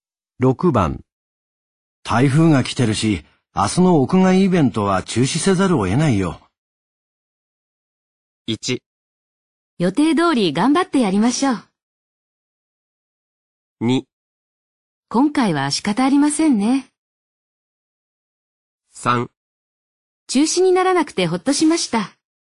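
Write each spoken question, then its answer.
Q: 台風が来てるし、明日の屋外イベントは中止せざるを得ないよ。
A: 2: 今回は仕方ありませんね。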